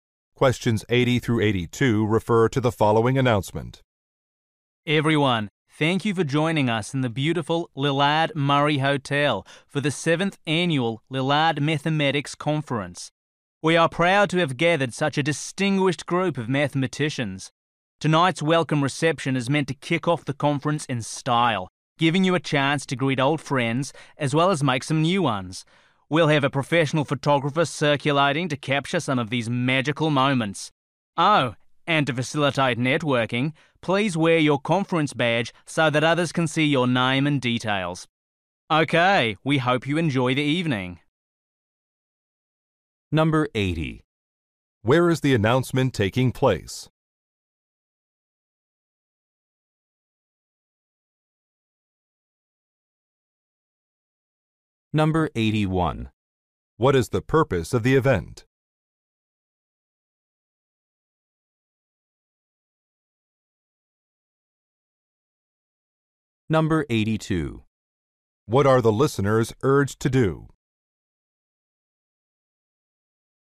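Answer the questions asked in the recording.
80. At a hotel
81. To welcome conference attendees
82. Wear their conference badges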